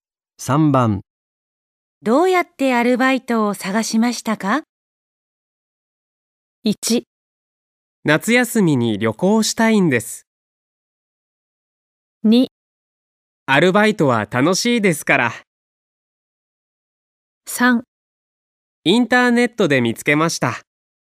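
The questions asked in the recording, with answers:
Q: どうやってアルバイトを探しましたか?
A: 3: インターネットで見つけました。

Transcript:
1
夏休みに旅行したいです。
2
アルバイトは楽しいですから。
3
インターネットで見つけました。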